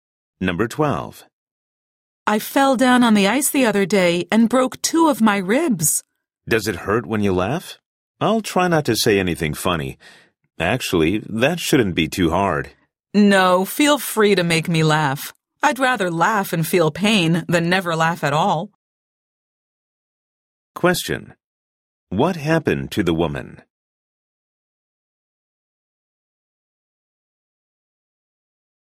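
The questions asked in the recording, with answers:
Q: What happened to the woman?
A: She fell on the ice and broke two ribs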